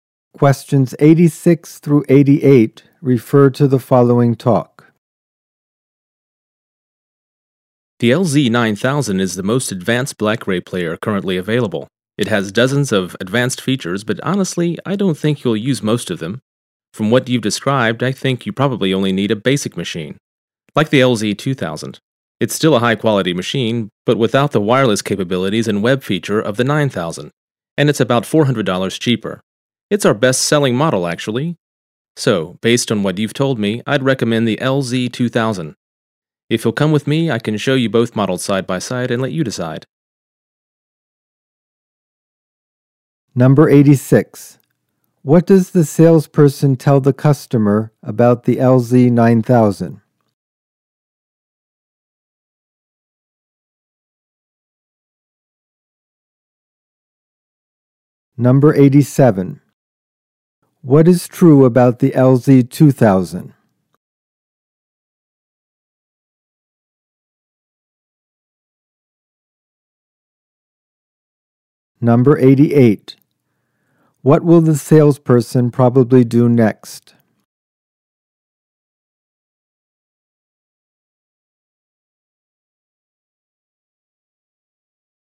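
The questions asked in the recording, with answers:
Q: What will the salesperson probably do next?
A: Show the customer both models side by side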